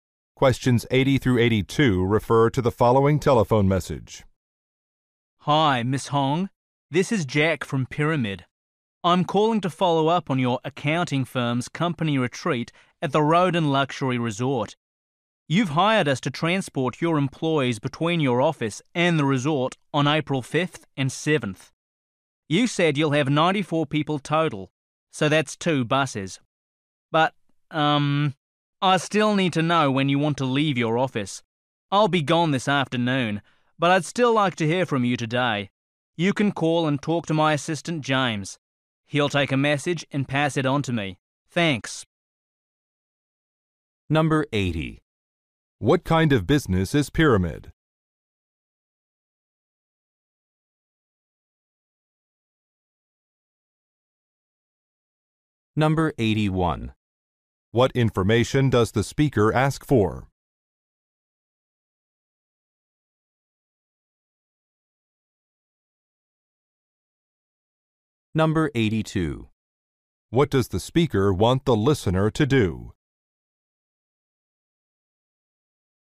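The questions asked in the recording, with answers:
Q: What kind of business is Pyramid?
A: A transportation (bus) company

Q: What information does the speaker ask for?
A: The departure time from the office

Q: What does the speaker want the listener to do?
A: Call and leave a message with his assistant today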